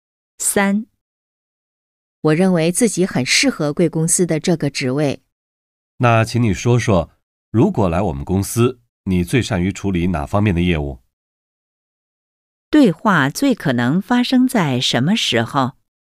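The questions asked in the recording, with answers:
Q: 对话最可能发生在什么时候?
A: 面试时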